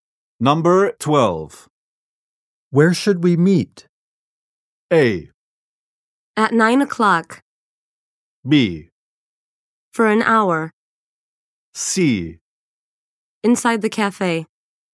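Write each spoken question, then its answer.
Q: Where should we meet?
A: C: Inside the cafe.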